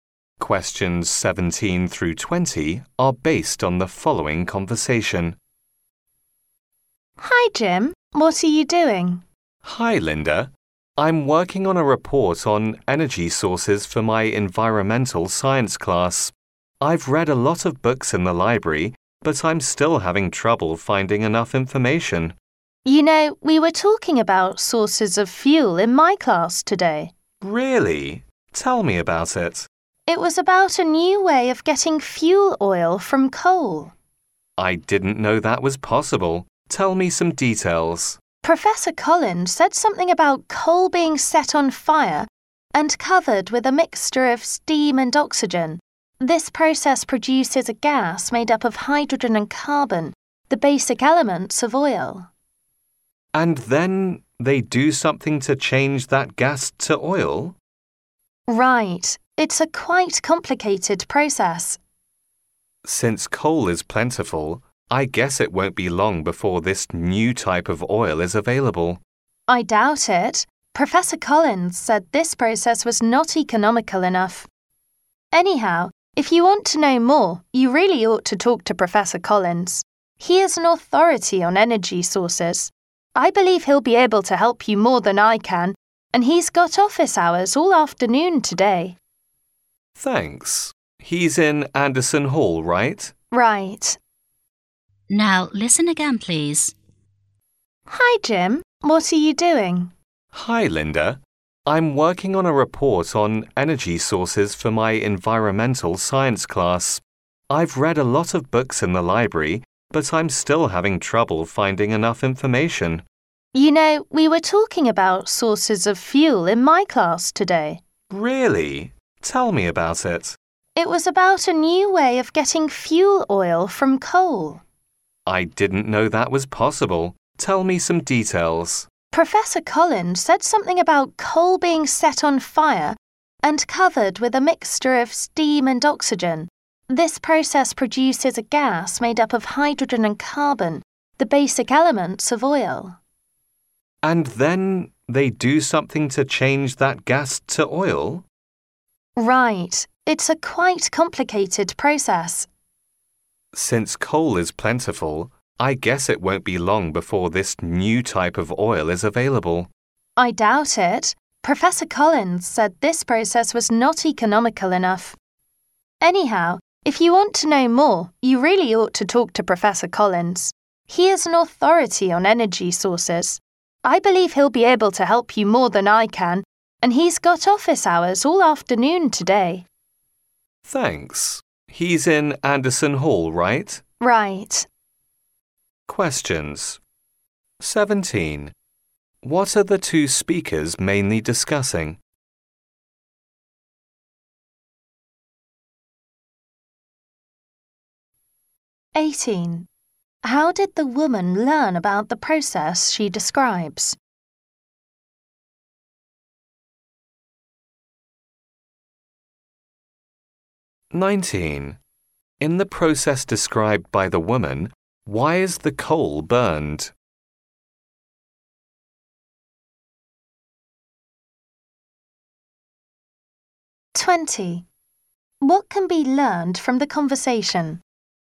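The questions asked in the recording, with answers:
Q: What are the two speakers mainly discussing?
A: A new way of getting fuel oil from coal

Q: How did the woman learn about the process she describes?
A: From her class / Professor Collins

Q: In the process described by the woman, why is the coal burned?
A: To produce a gas of hydrogen and carbon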